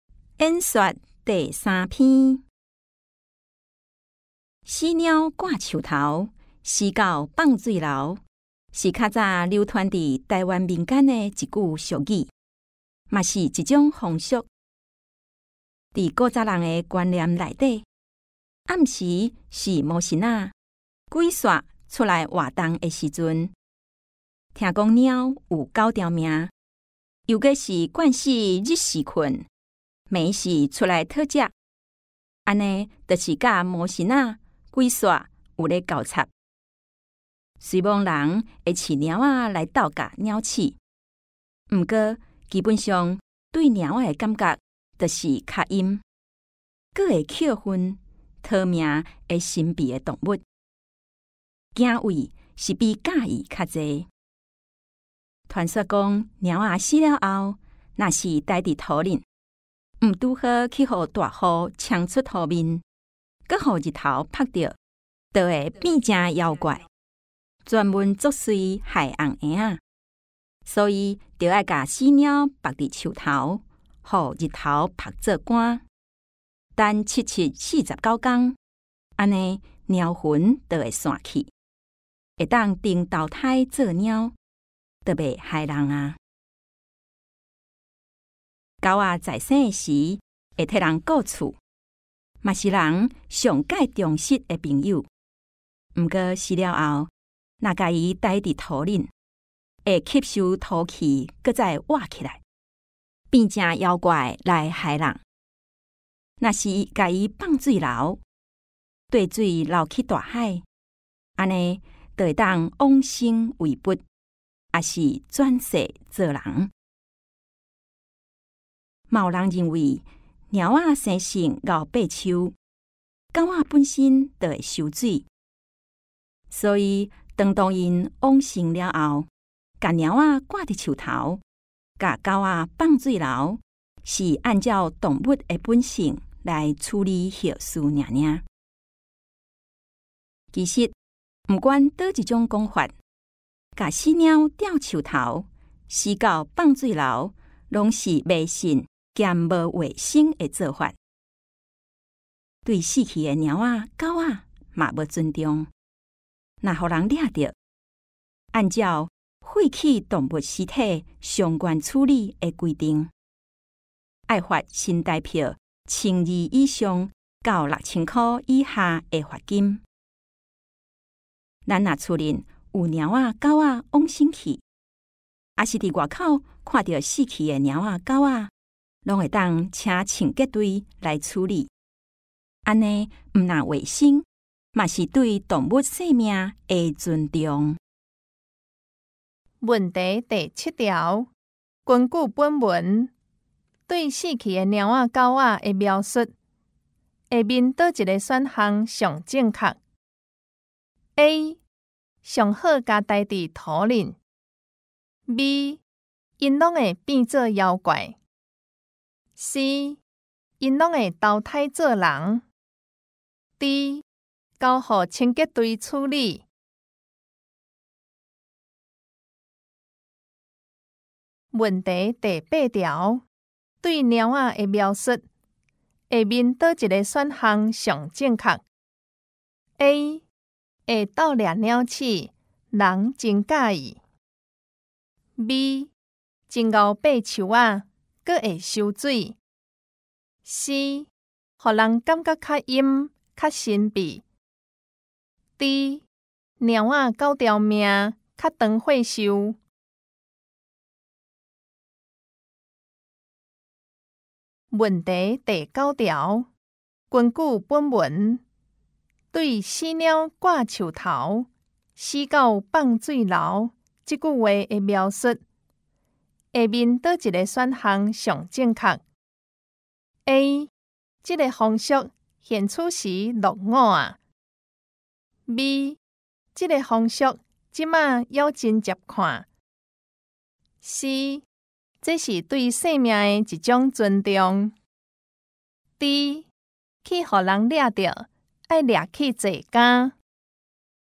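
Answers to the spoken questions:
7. D: 交予清洁队处理
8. C: 让人感觉较阴、较神秘
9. A: 这个风俗现出时落伍啊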